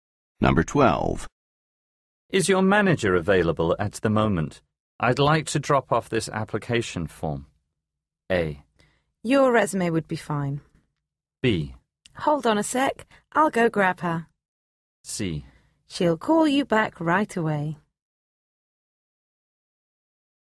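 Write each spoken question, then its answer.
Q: Is your manager available at the moment?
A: B: Hold on a sec, I'll go grab her.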